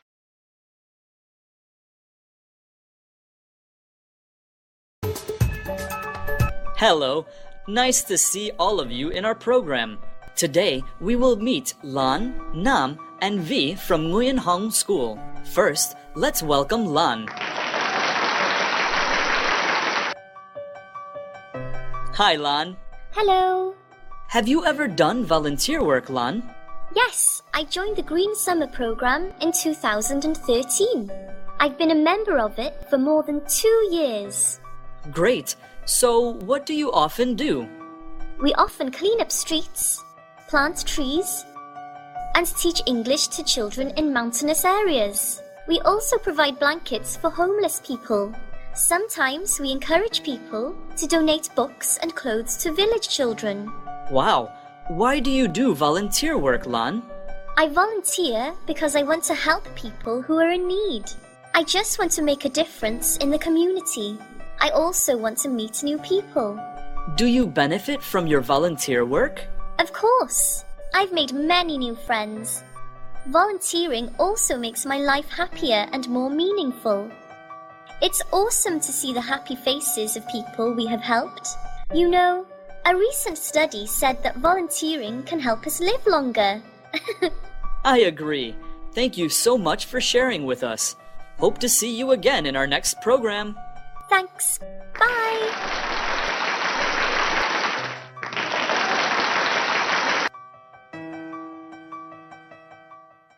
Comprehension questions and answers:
Task: Fill in the blanks with one or two words.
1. Lan joined the Green Summer Program in ________.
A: 2013

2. She has been a member for more than ________ years.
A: two

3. Her team often ________ streets and ________ trees.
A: clean; plant

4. They also provide ________ for homeless people.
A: blankets

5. Lan says volunteering makes her life ________ and more meaningful.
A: happier

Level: lớp 7